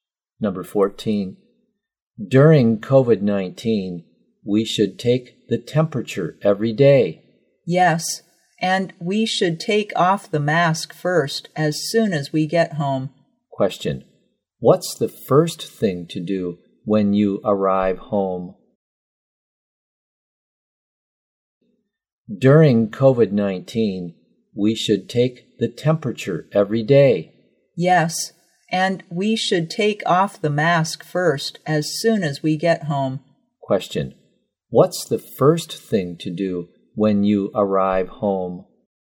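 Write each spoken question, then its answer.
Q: what's the first thing to do when you arrive home?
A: Take off the mask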